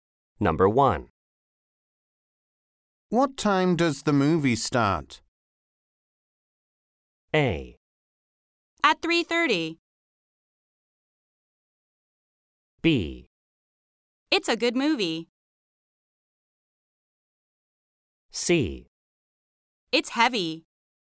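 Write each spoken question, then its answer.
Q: What time does the movie start?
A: A: At 3:30.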